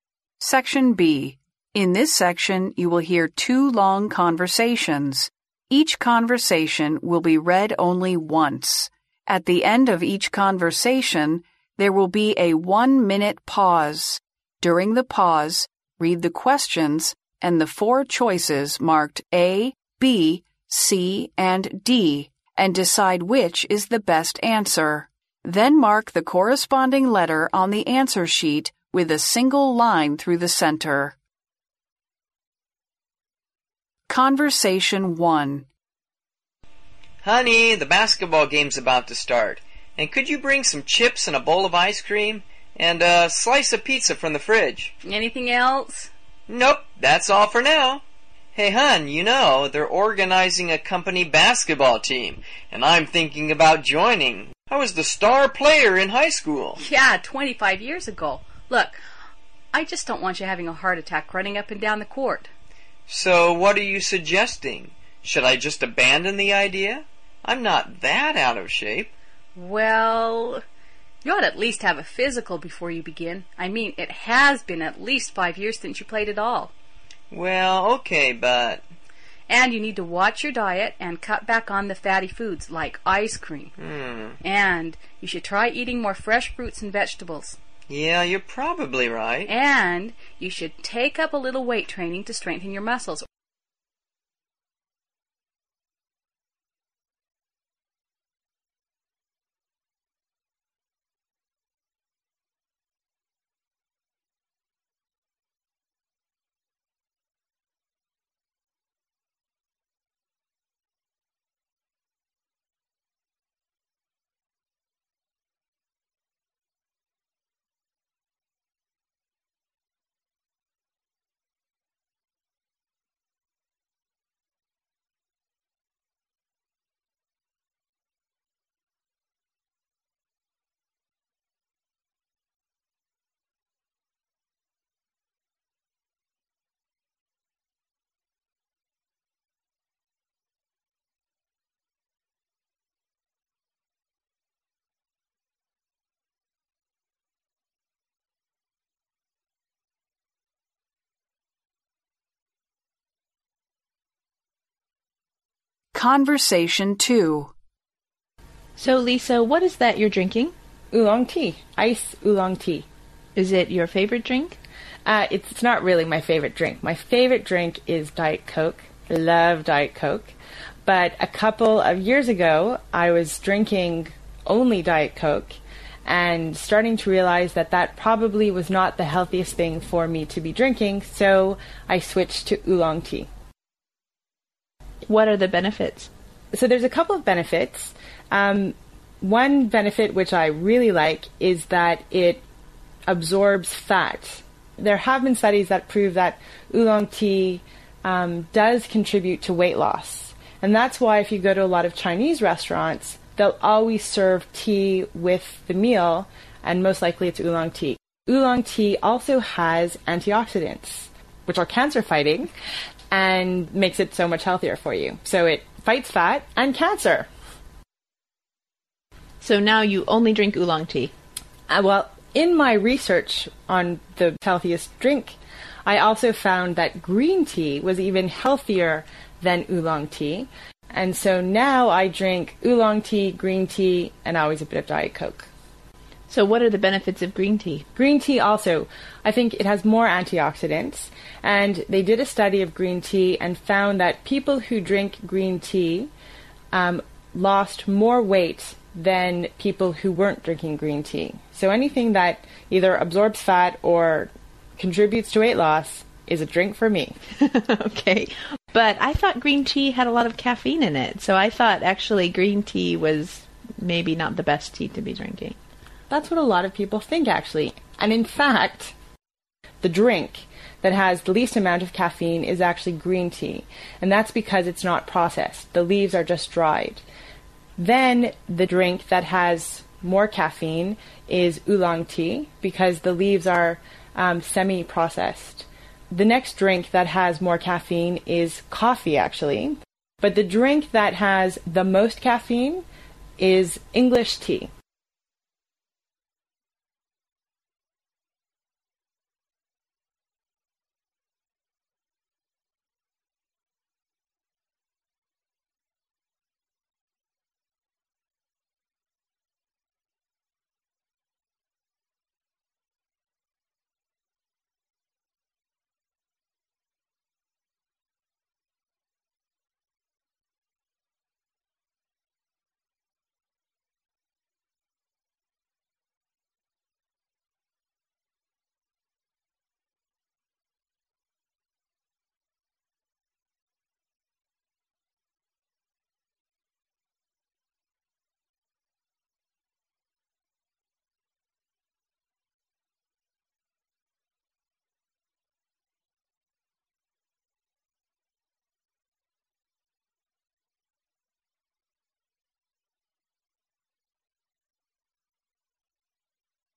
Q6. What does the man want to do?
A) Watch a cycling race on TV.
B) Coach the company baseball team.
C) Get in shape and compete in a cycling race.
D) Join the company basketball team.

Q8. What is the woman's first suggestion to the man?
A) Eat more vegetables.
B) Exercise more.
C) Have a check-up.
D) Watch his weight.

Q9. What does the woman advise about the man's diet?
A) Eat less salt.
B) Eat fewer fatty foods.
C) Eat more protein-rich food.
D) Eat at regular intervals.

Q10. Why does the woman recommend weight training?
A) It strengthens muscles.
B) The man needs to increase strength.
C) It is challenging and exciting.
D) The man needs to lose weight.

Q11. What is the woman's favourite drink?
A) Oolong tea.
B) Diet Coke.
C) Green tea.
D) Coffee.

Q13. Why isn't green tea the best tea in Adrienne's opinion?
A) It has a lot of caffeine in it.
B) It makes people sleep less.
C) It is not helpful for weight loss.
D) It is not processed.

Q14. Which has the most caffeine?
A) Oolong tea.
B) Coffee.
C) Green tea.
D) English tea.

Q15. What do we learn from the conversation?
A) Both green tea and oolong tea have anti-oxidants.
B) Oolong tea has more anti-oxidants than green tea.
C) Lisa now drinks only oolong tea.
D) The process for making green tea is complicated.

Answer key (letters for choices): 6D, 8C, 9B, 10A, 11B, 13A, 14D, 15A

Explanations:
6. 对话中男士提到"they're organizing a company basketball team, and I'm thinking about joining.",由此可知,他想要加入company basketball team,故选D项。
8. 男士不想放弃加入篮球队,于是女士建议他"you ought to at least have a physical before you begin",即让他先去体检,故答案为C项。
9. 接着女士建议他"And you need to watch your diet and cut back on the fatty foods",即让他注意饮食,少吃油脂食品,故选B项。
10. 对话最后女士提到"And you should take up a little weight training to strengthen your muscles.",由此可知,女士建议他进行举重训练是为了让他加强肌肉力量,故选A项。
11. 对话中女士提到"My favorite drink is Diet Coke.",由此可知,她最喜欢的饮料是健怡可乐,故选B项。
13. Adrienne在对话中提到"but I thought green tea had a lot of caffeine in it",由此可知,Adrienne不认为绿茶是最好的茶,是因为绿茶含很多咖啡因,故答案为A项。
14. Lisa在对话最后提到"the drink that has the most caffeine is English tea",因此含咖啡因最多的是英国茶,故答案为D项。
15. 录音中Lisa提到"Oolong tea also has anti-oxidants",由此可知乌龙茶含有抗氧化剂,之后她又提到"Green tea, also, I think it has more anti-oxidants",因此绿茶和乌龙茶中都含有抗氧化剂,故答案为A项。